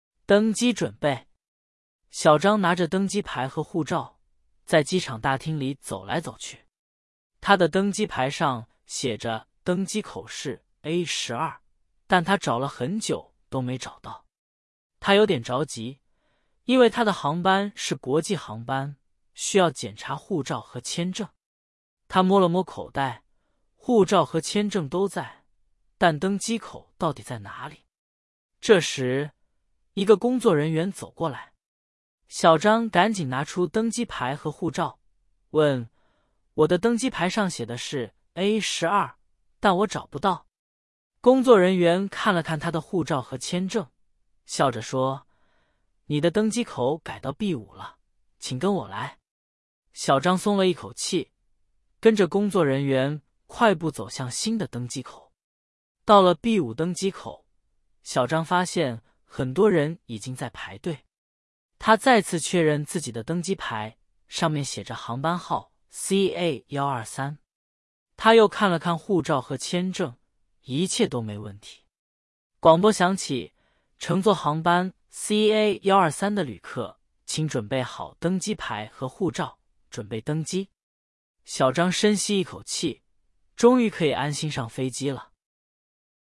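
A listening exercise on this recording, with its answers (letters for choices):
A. A12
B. B5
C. C3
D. D7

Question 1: 小张的登机牌上写的是哪个登机口?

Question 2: 工作人员告诉小张登机口改到了哪里?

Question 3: 小张的航班号是多少?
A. CA123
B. CA456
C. CA789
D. CA000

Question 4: 广播里要求旅客准备好什么?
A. 登机牌和护照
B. 行李和签证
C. 机票和身份证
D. 手机和钱包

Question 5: 小张一开始就找到了登机口。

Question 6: 小张的航班是国际航班。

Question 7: 工作人员没有帮助小张。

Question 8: 登机口从A12改到了B5。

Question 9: 小张的航班号是CA456。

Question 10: 小张最后安心上了飞机。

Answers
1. A
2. B
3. A
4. A
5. 错
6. 对
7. 错
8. 对
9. 错
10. 对

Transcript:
登机准备
小张拿着登机牌和护照,在机场大厅里走来走去。他的登机牌上写着登机口是A12,但他找了很久都没找到。他有点着急,因为他的航班是国际航班,需要检查护照和签证。他摸了摸口袋,护照和签证都在,但登机口到底在哪里?
这时,一个工作人员走过来。小张赶紧拿出登机牌和护照,问:"我的登机牌上写的是A12,但我找不到。"工作人员看了看他的护照和签证,笑着说:"你的登机口改到B5了,请跟我来。"小张松了一口气,跟着工作人员快步走向新的登机口。
到了B5登机口,小张发现很多人已经在排队。他再次确认自己的登机牌,上面写着航班号CA123。他又看了看护照和签证,一切都没问题。广播响起:"乘坐航班CA123的旅客,请准备好登机牌和护照,准备登机。"小张深吸一口气,终于可以安心上飞机了。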